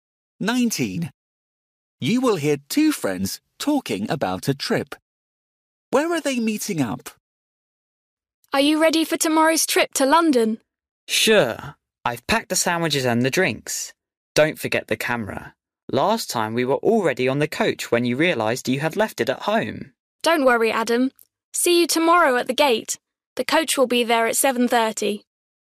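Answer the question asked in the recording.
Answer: At the gate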